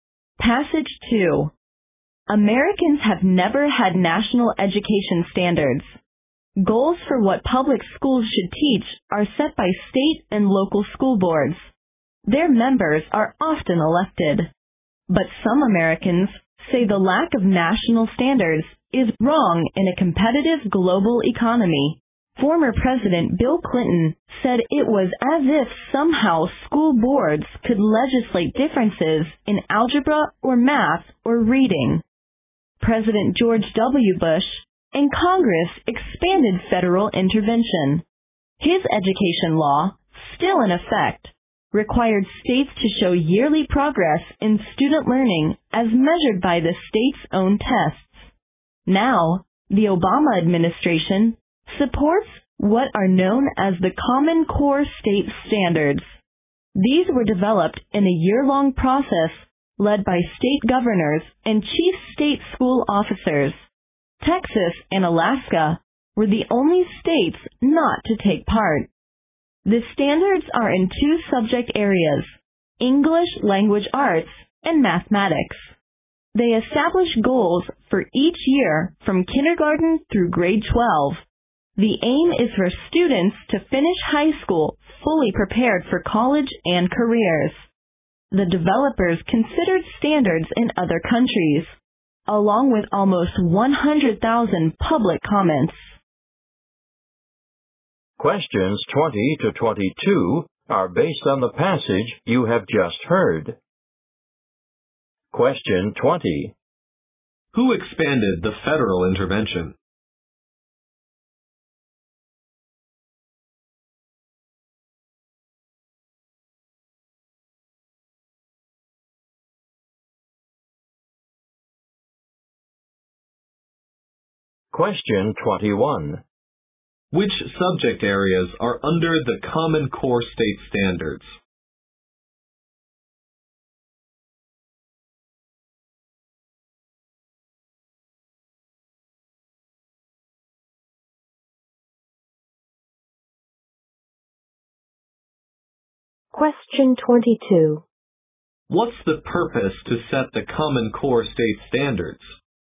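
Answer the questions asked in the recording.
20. President George W. Bush and Congress
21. English language arts and mathematics
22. For students to finish high school fully prepared for college and careers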